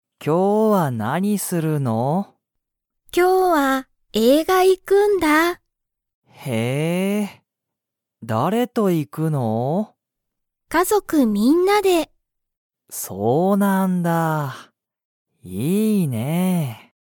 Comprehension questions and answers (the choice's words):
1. リカは、今日きょう映画(えいが)に行(い)きますか?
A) はい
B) いいえ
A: はい

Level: Level 1